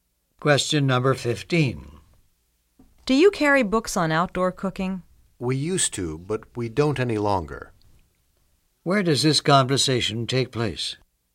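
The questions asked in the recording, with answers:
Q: Where does this conversation take place?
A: In a bookstore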